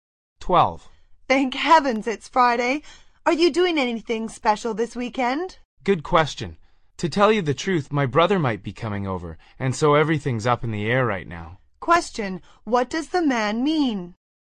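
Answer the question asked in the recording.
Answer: His weekend plans are still uncertain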